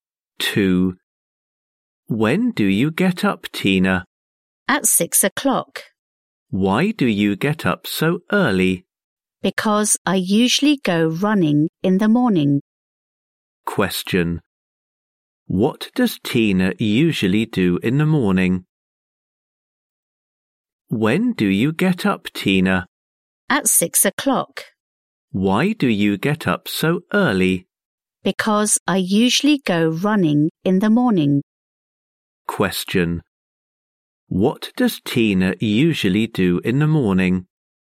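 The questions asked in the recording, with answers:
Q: What does Tina usually do in the morning?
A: She goes running.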